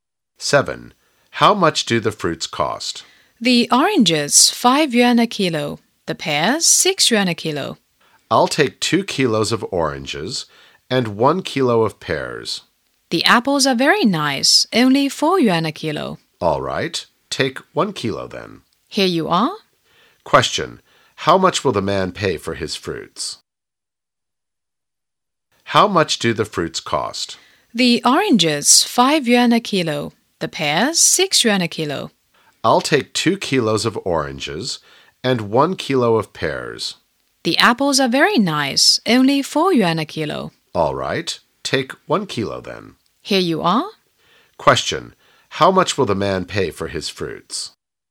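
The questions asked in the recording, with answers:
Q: how much will the man pay for his fruits?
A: 20 yuan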